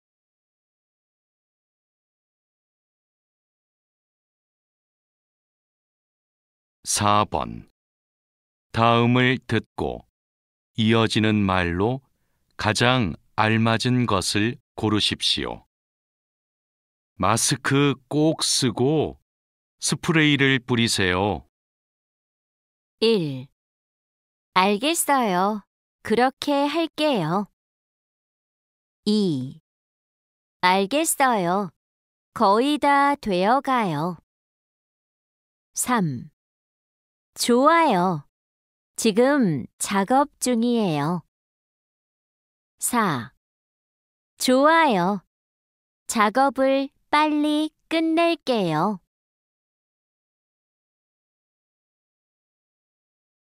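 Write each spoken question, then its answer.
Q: 마스크 꼭 쓰고 스프레이를 뿌리세요.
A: 1: 알겠어요. 그렇게 할게요.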